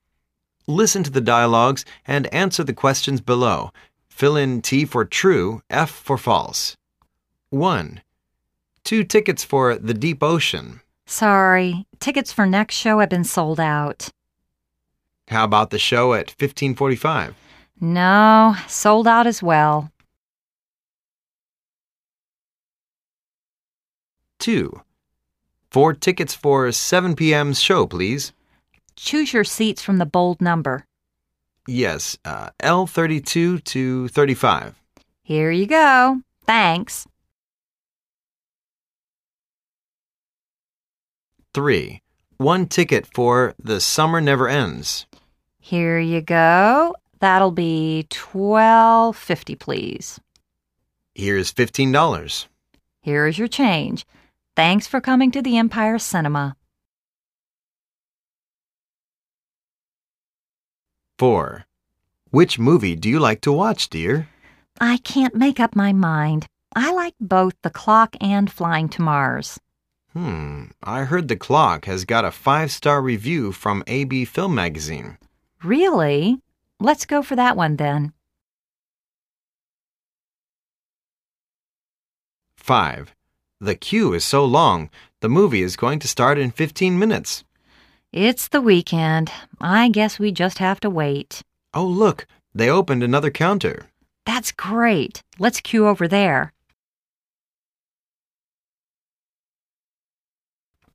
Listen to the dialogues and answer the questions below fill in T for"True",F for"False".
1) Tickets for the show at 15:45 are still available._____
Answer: F

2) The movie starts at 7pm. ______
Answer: T

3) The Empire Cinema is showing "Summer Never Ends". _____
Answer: T

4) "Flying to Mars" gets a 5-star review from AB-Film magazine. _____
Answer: F

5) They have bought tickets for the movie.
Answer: F